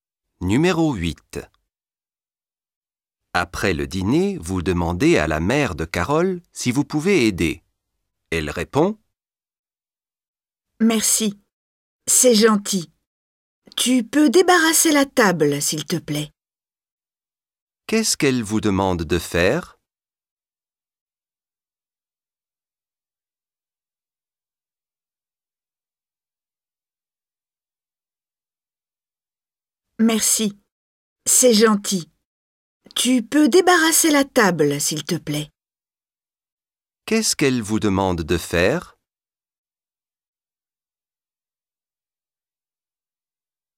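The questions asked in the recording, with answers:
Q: Qu'est-ce qu'elle vous demande de faire ?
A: Débarrasser la table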